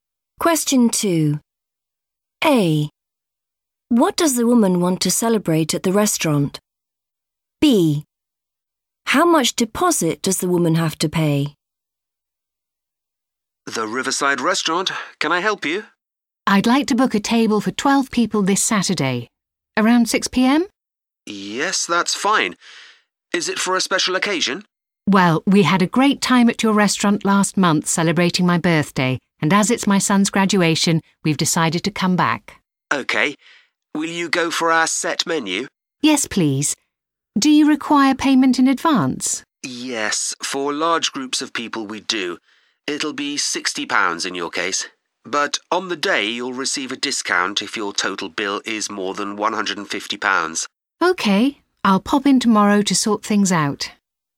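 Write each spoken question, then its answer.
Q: What does the woman want to celebrate at the restaurant?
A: her son's graduation

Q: How much deposit does the woman have to pay?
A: £60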